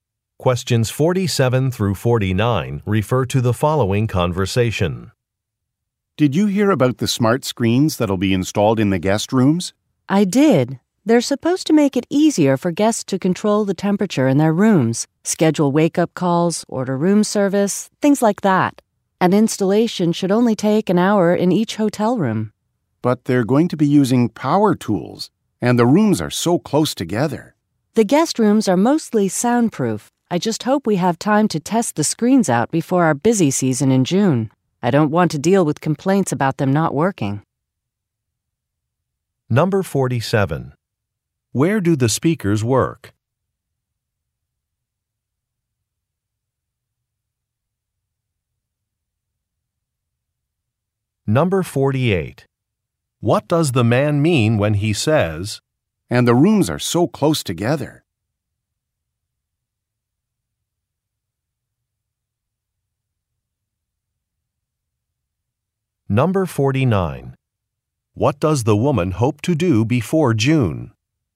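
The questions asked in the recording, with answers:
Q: Where do the speakers work?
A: At a hotel

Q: What does the woman hope to do before June?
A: Test the screens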